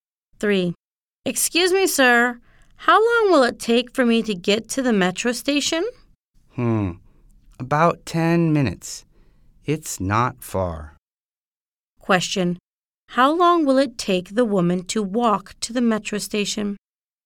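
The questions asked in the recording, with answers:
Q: How long will it take the woman to walk to the metro station?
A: About 10 minutes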